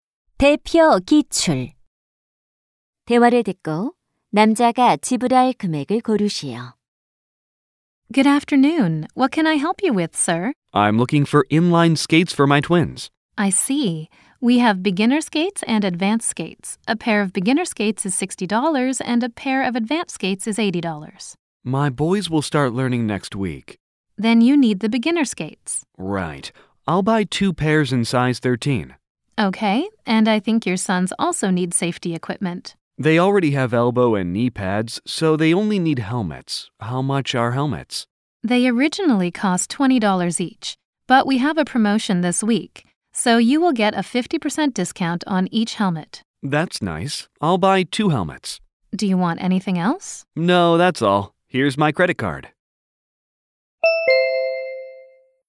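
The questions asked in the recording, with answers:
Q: 대화를 듣고 남자가 지불할 금액을 고르시오.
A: $140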